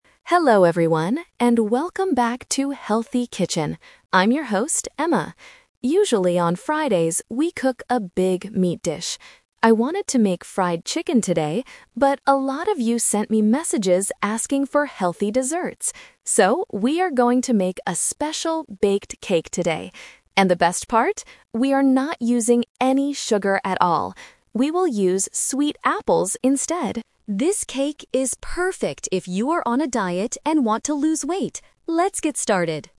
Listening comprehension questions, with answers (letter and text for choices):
Listen to the TV host introducing a cooking show. Choose the correct answer (A, B, or C) for each question.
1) What is the host going to cook today?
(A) Fried chicken.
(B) A baked cake.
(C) A fruit salad.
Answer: (B) A baked cake.

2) What is special about today's dish?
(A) It does not have any sugar.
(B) It has a lot of meat.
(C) It is very fast to make.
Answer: (A) It does not have any sugar.

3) Who is this dish perfect for?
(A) People who love fried food.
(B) People who want to gain weight.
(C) People who are on a diet.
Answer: (C) People who are on a diet.

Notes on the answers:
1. The host clearly says, "So, we are going to make a special baked cake today!" Option (A) is a trap; she wanted to make fried chicken at first, but changed her mind because the viewers asked for desserts. Option (C) is a plausible healthy dish, but it is not mentioned in the audio.
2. The host highlights the best part of the recipe: "We are not using any sugar at all." Option (B) is a trap; she mentions a big meat dish is what they usually cook on Fridays, but not today. Option (C) is a plausible benefit of a recipe, but it is not mentioned.
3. At the end, the host states, "This cake is perfect if you are on a diet...". Option (A) is a trap related to the "fried chicken" mentioned earlier. Option (B) is the exact opposite of what the host says (she says it is for people who want to "lose weight", not gain weight).

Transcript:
Host: Hello everyone, and welcome back to 'Healthy Kitchen'! I'm your host, Emma. Usually, on Fridays, we cook a big meat dish. I wanted to make fried chicken today, but a lot of you sent me messages asking for healthy desserts. So, we are going to make a special baked cake today! And the best part? We are not using any sugar at all. We will use sweet apples instead. This cake is perfect if you are on a diet and want to lose weight. Let's get started!

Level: A2